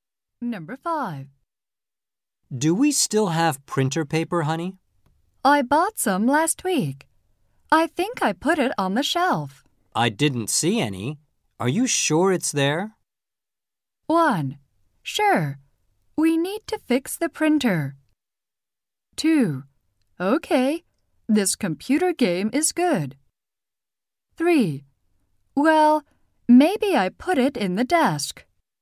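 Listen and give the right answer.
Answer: 3: Well, maybe I put it in the desk.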